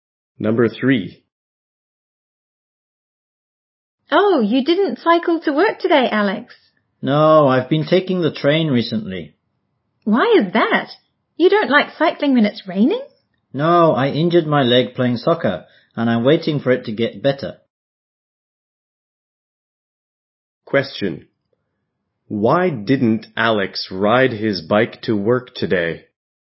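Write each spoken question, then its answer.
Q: Why didn't Alex ride his bike to work today?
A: He injured his leg playing soccer.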